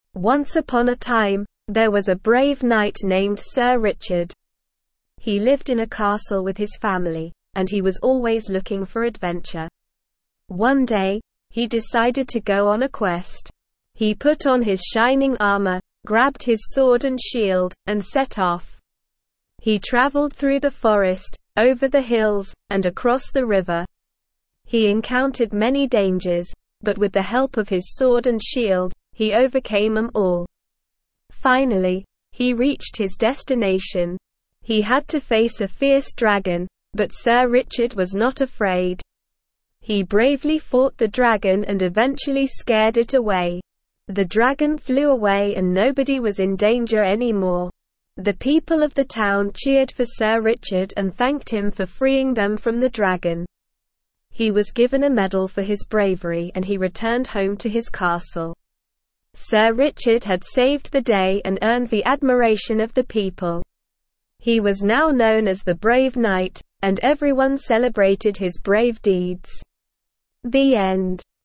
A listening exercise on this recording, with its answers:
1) Sir Richard was brave and always looking for ___________.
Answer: adventure

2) He wore his ___________ and grabbed his sword and shield before setting off.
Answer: shining armor

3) He encountered many ___________ during his quest.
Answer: dangers

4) At the end of his voyage, he had to face a ___________.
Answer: fierce dragon

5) He ___________ the dragon and earned the admiration of the people.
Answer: bravely fought

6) He was given a ___________ for his bravery.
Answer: medal

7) He was now known as the ___________.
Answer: Brave Knight

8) The people of the town ___________ for him and thanked him.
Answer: cheered

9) He returned home to his ___________.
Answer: castle

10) Who was the brave knight in the story?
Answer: Sir Richard.

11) What did Sir Richard equip himself with before setting off on his quest?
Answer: He put on his shining armor, grabbed his sword and shield.

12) What dangers did Sir Richard encounter on his journey?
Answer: He encountered many dangers.

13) What was Sir Richard's destination?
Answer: His destination was to face a fierce dragon.

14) What reward did Sir Richard receive for his bravery?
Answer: He was given a medal for his bravery.

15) How did the people of the town thank Sir Richard?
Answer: The people of the town cheered for Sir Richard and thanked him for freeing them from the dragon.

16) What was Sir Richard now known as?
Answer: He was now known as the Brave Knight.

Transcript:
Once upon a time, there was a brave knight named Sir Richard. He lived in a castle with his family, and he was always looking for adventure.
One day, he decided to go on a quest. He put on his shining armor, grabbed his sword and shield, and set off.
He traveled through the forest, over the hills, and across the river. He encountered many dangers, but with the help of his sword and shield, he overcame them all.
Finally, he reached his destination. He had to face a fierce dragon, but Sir Richard was not afraid. He bravely fought the dragon and eventually scared it away. The dragon flew away and nobody was in danger anymore.
The people of the town cheered for Sir Richard and thanked him for freeing them from the dragon. He was given a medal for his bravery and he returned home to his castle.
Sir Richard had saved the day and earned the admiration of the people. He was now known as the Brave Knight, and everyone celebrated his brave deeds.
The end.

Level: Level 1